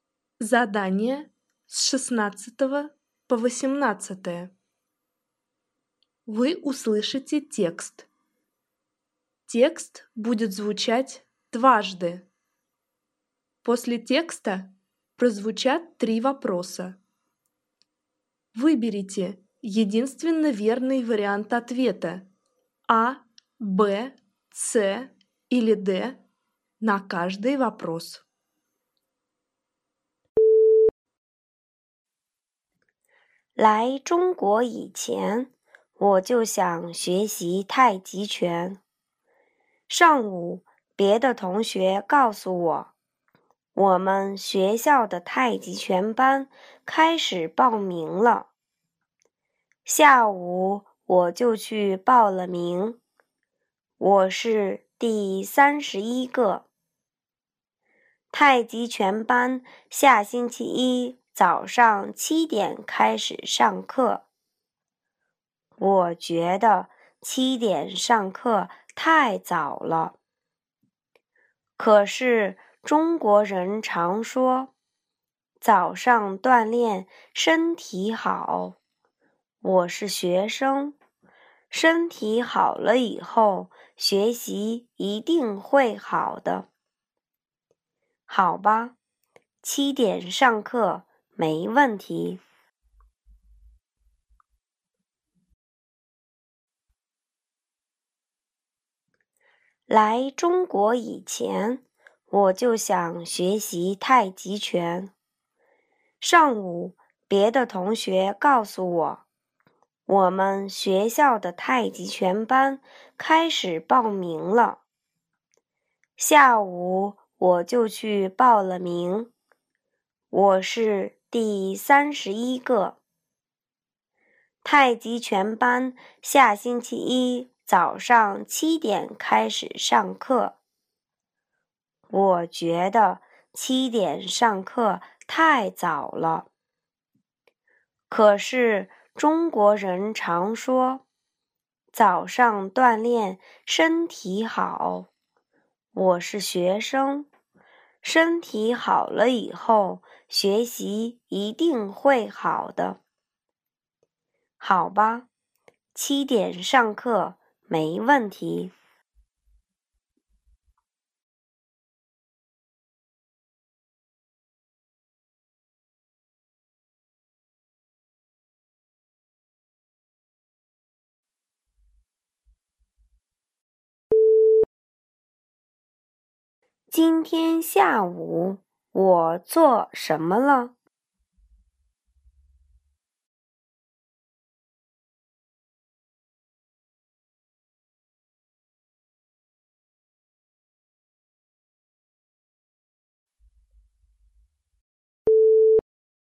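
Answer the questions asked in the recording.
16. 报名参加太极拳班
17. 下星期一早上7点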